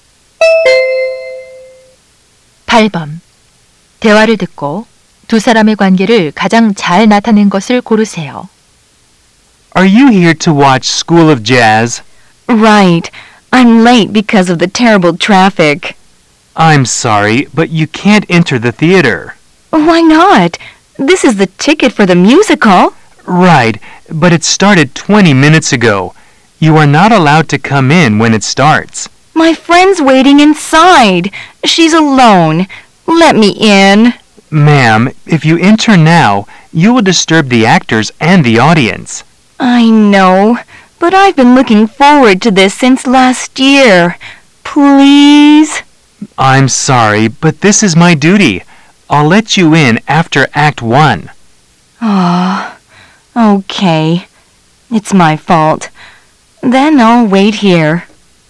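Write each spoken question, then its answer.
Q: 대화를 듣고 두 사람의 관계를 가장 잘 나타낸 것을 고르세요.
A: 극장 안내원 - 관객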